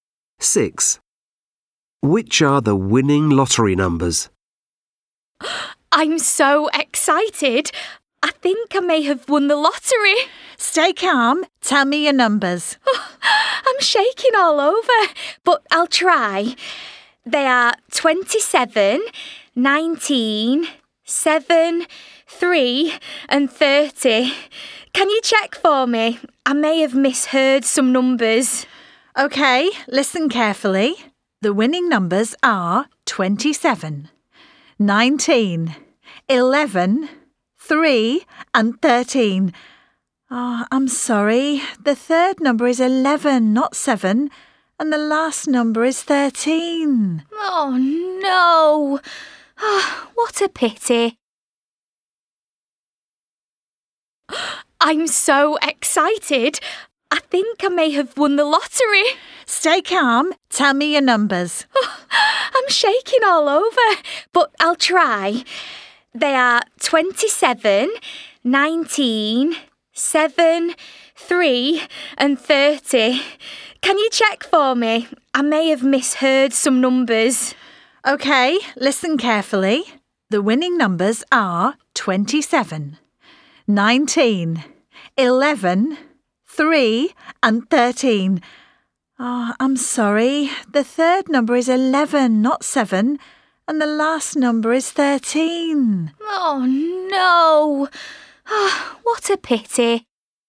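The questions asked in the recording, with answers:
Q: Which are the winning lottery numbers?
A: 27, 19, 11, 3 and 13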